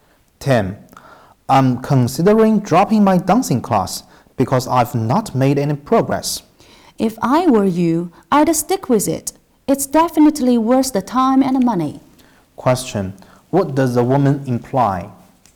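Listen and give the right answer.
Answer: The man should keep taking the dancing class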